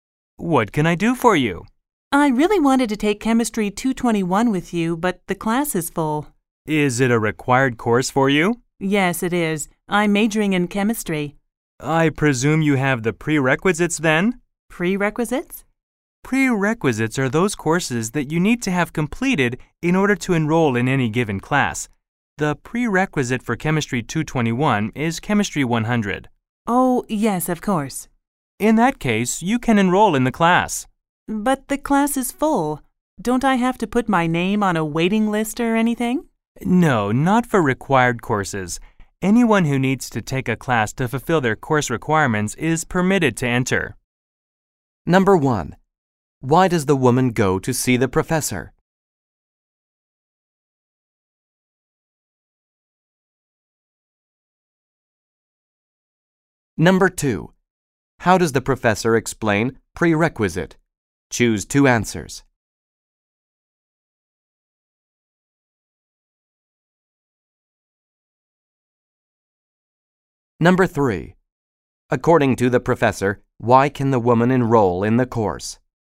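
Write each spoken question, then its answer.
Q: Why does the woman go to see the professor?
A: She wants to take Chemistry 221 but the class is full.

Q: How does the professor explain prerequisite?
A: Courses you must have completed before enrolling in a given class.

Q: According to the professor, why can the woman enroll in the course?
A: It is a required course for her major and she has completed the prerequisite, Chemistry 100.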